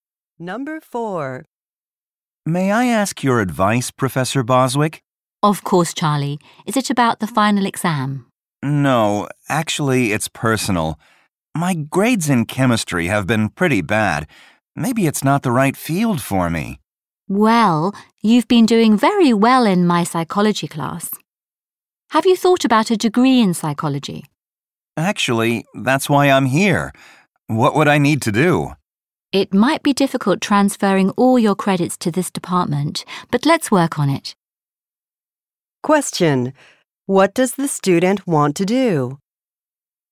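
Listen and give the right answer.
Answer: Change to a psychology degree.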